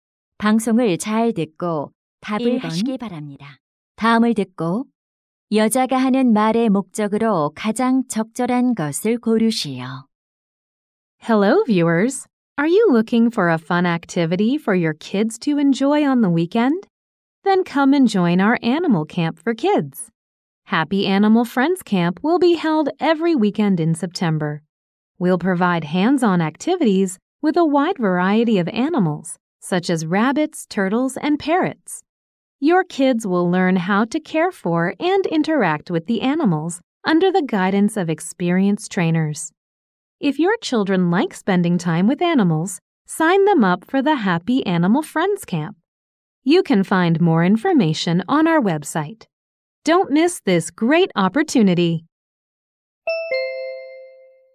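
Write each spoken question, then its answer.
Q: 다음을 듣고 여자가 하는 말의 목적으로 가장 적절한 것을 고르시오.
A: 어린이 동물 캠프 참가를 홍보하려고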